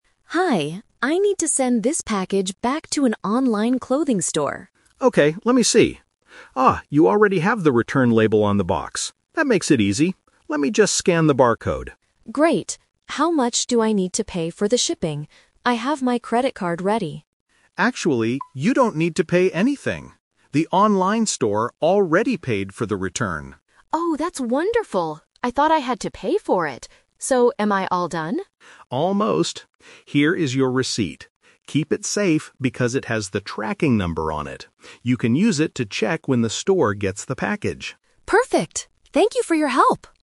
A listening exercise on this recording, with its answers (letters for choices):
Listen to the conversation between a customer and a postal worker. Read the questions and choose the correct answer (A, B, or C).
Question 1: What is the customer doing at the post office?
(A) Buying a new shipping box.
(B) Sending a package back to a store.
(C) Picking up some new clothes.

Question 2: How will the customer pay for the shipping?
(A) She does not have to pay.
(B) She will pay with a credit card.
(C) She will pay the online store later.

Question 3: Why should the customer keep the receipt?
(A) To get a cash refund from the post office.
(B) To buy another return label.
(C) To track the package online.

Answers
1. B
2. A
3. C

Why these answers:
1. The customer says right at the beginning, "I need to send this package back to an online clothing store." Why the trap is wrong: Option (C) is a trap. She mentions an "online clothing store," but she is returning the clothes, not picking them up. Option (A) is a plausible post office activity, but she already has the box.
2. This is the "Twist". The postal worker says, "Actually, you don't need to pay anything." Why the trap is wrong: Option (B) is a strong trap. The customer says, "I have my credit card ready," showing her intention to pay, but her plan changes because shipping is free.
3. The postal worker tells her to keep it because "it has the tracking number on it. You can use it to check when the store gets the package" (which means tracking the package). Why the trap is wrong: Option (A) is a very common distractor in the "Returning goods" topic. Usually, a receipt is for a cash refund, but at a post office, this specific receipt is for tracking.

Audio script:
Customer: Hi, I need to send this package back to an online clothing store.
Postal Worker: Okay, let me see. Ah, you already have the return label on the box. That makes it easy. Let me just scan the barcode.
Customer: Great. How much do I need to pay for the shipping? I have my credit card ready.
Postal Worker: Actually, you don't need to pay anything. The online store already paid for the return.
Customer: Oh, that's wonderful! I thought I had to pay for it. So, am I all done?
Postal Worker: Almost. Here is your receipt. Keep it safe because it has the tracking number on it. You can use it to check when the store gets the package.